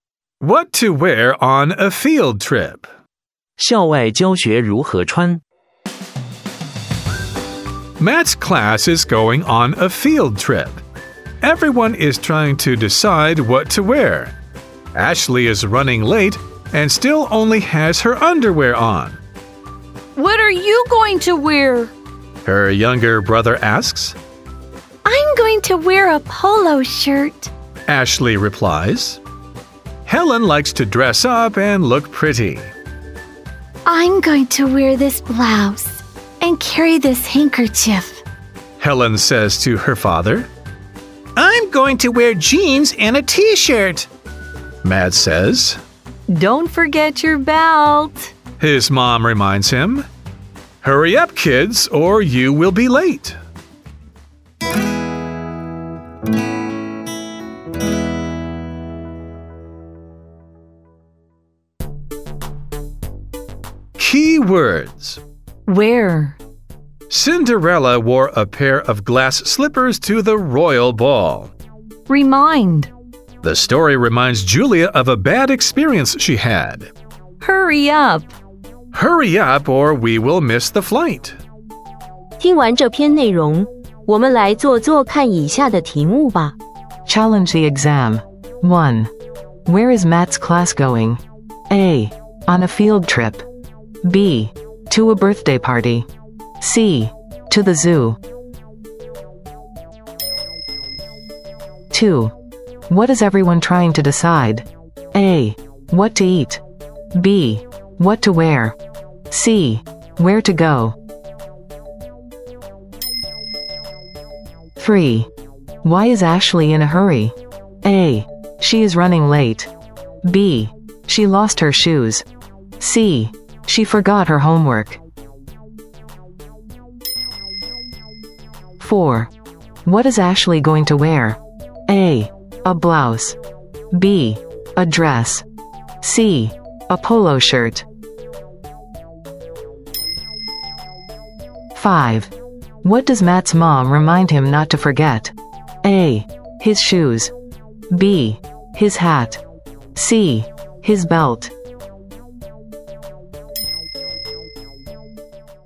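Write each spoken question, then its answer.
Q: Where is Matt's class going?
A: A: On a field trip.

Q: What is everyone trying to decide?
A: B: What to wear.

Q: Why is Ashley in a hurry?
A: A: She is running late.

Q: What is Ashley going to wear?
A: C: A polo shirt.

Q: What does Matt's mom remind him not to forget?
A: C: His belt.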